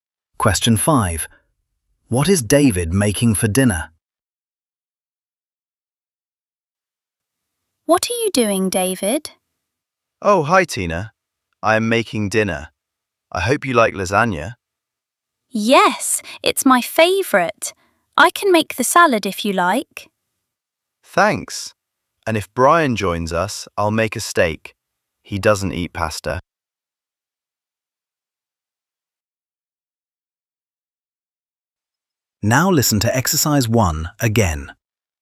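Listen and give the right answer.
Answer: Lasagna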